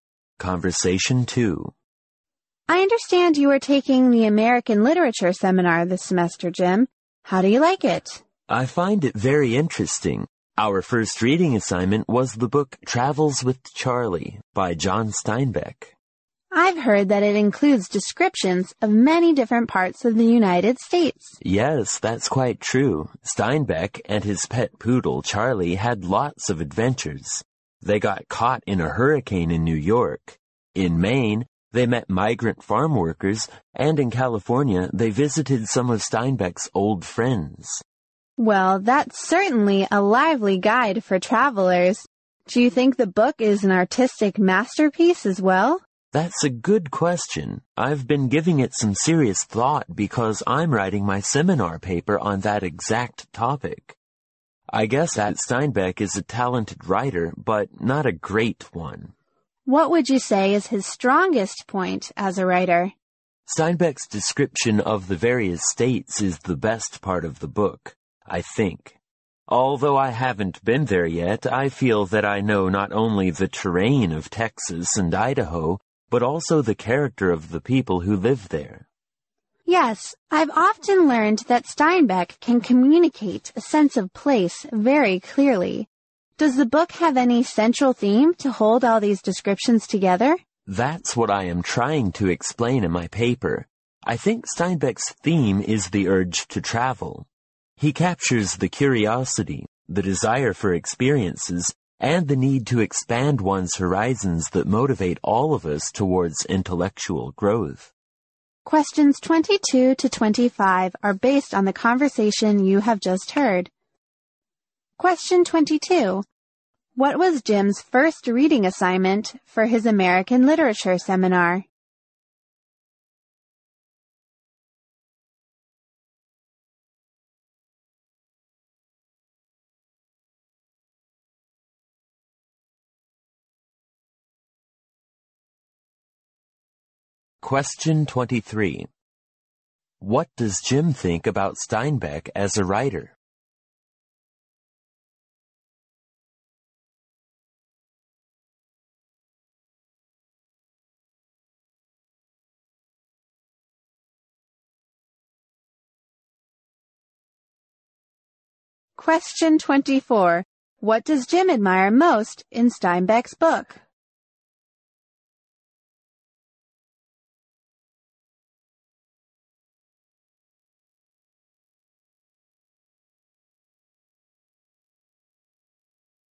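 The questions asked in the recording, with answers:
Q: What was Jim's first reading assignment for his American Literature seminar?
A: Travels with Charlie by John Steinbeck

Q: What does Jim think about Steinbeck as a writer?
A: Talented but not great

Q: What does Jim admire most in Steinbeck's book?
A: His descriptions of the various states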